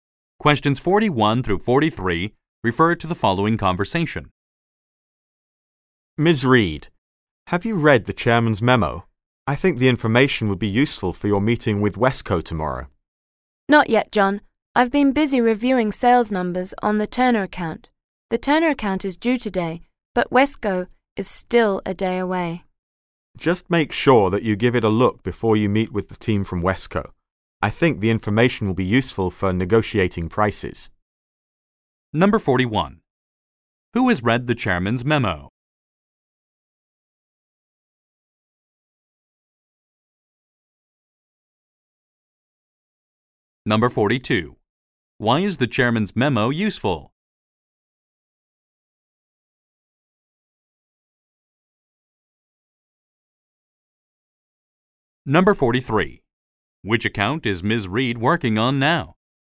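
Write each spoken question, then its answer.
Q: Why is the chairman's memo useful?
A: It will help in negotiating prices with Wesco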